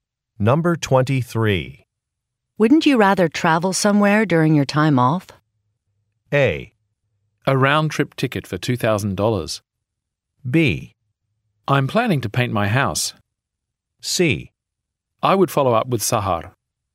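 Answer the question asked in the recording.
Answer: B: I'm planning to paint my house.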